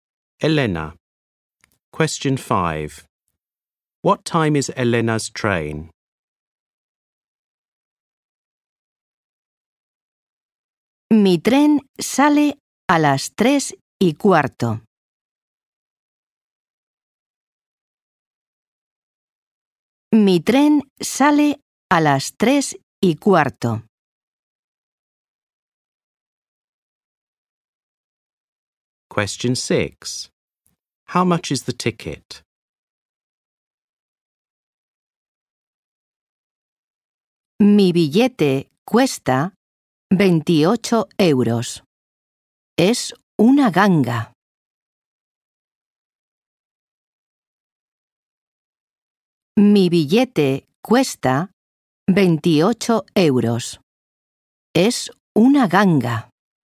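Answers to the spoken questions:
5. 3:15
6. 28 euros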